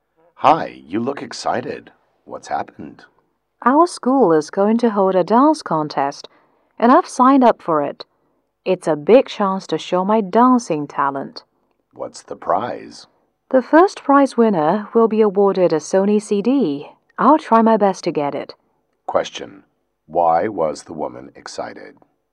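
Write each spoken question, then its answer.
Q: Why was the woman excited?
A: She signed up for the school dance contest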